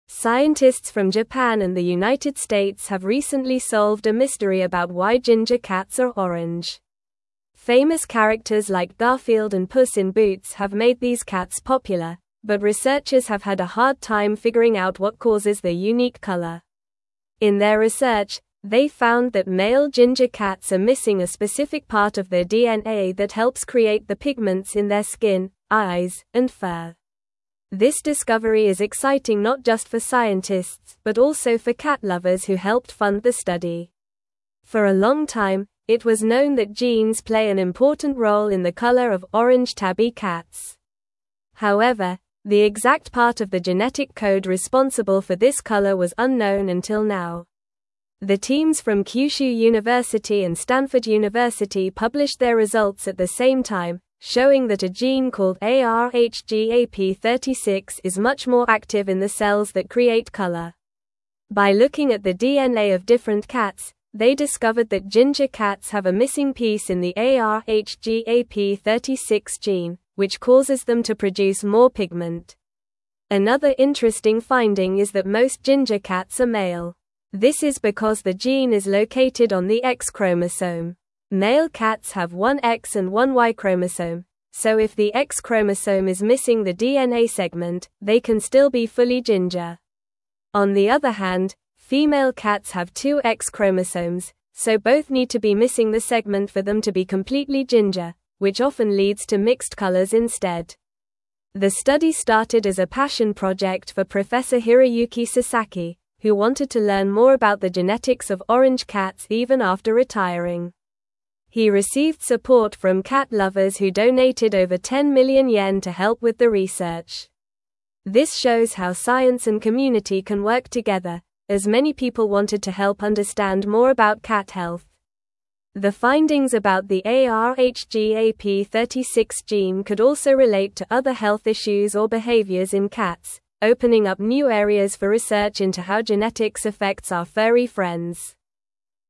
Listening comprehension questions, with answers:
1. Scientists from Japan and the United (1)______ have recently solved a mystery about why ginger cats are orange.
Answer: States

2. but researchers have had a hard time (2)______ out what causes their unique (3)______.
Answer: figuring

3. but researchers have had a hard time (2)______ out what causes their unique (3)______.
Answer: color

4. they found that male ginger cats are missing a specific part of their DNA that helps (4)______ the pigments in their skin, eyes, and fur.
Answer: create

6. The teams from Kyushu (5)______ and (6)______ University published their results at the same time, (7)______ that a gene called ARHGAP36 is much more active in the cells that create color.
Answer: Stanford

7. The teams from Kyushu (5)______ and (6)______ University published their results at the same time, (7)______ that a gene called ARHGAP36 is much more active in the cells that create color.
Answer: showing

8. By (8)______ at the DNA of different cats, they discovered that ginger cats have a missing piece in the ARHGAP36 gene, which causes them to produce more pigment.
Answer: looking

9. Another interesting (9)______ is that most (10)______ cats are male.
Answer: finding

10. Another interesting (9)______ is that most (10)______ cats are male.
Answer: ginger

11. which often leads to (11)______ colors instead.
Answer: mixed

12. The (12)______ started as a passion project for Professor Hiroyuki Sasaki,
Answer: study

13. He (13)______ support from cat (14)______ who donated over 10 million yen to help with the research.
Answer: received

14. He (13)______ support from cat (14)______ who donated over 10 million yen to help with the research.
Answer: lovers

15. This (15)______ how science and community can work together,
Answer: shows

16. opening up new areas for research into how genetics affects our (16)______ friends.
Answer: furry

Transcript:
Scientists from Japan and the United States have recently solved a mystery about why ginger cats are orange. Famous characters like Garfield and Puss in Boots have made these cats popular, but researchers have had a hard time figuring out what causes their unique color. In their research, they found that male ginger cats are missing a specific part of their DNA that helps create the pigments in their skin, eyes, and fur. This discovery is exciting not just for scientists but also for cat lovers who helped fund the study.
For a long time, it was known that genes play an important role in the color of orange tabby cats. However, the exact part of the genetic code responsible for this color was unknown until now. The teams from Kyushu University and Stanford University published their results at the same time, showing that a gene called ARHGAP36 is much more active in the cells that create color. By looking at the DNA of different cats, they discovered that ginger cats have a missing piece in the ARHGAP36 gene, which causes them to produce more pigment.
Another interesting finding is that most ginger cats are male. This is because the gene is located on the X chromosome. Male cats have one X and one Y chromosome, so if the X chromosome is missing the DNA segment, they can still be fully ginger. On the other hand, female cats have two X chromosomes, so both need to be missing the segment for them to be completely ginger, which often leads to mixed colors instead.
The study started as a passion project for Professor Hiroyuki Sasaki, who wanted to learn more about the genetics of orange cats even after retiring. He received support from cat lovers who donated over 10 million yen to help with the research. This shows how science and community can work together, as many people wanted to help understand more about cat health. The findings about the ARHGAP36 gene could also relate to other health issues or behaviors in cats, opening up new areas for research into how genetics affects our furry friends.

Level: Level 3